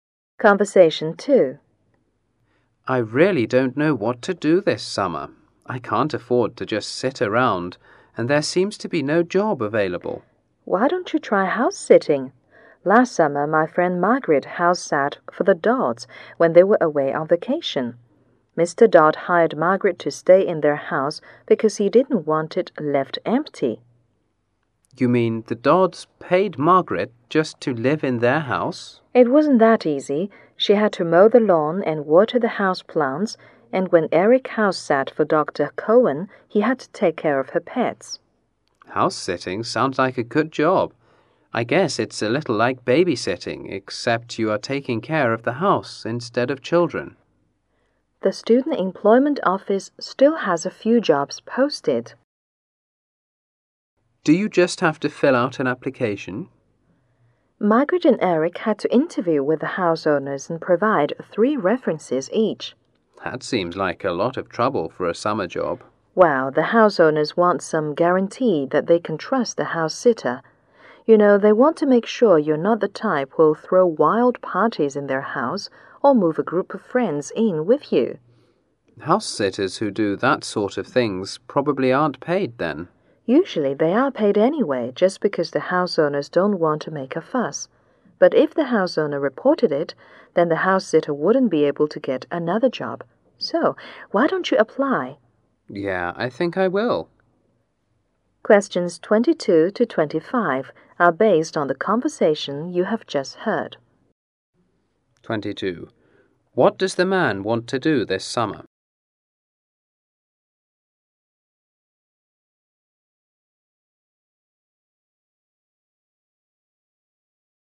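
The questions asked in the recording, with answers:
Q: What does the man want to do this summer?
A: Find a summer job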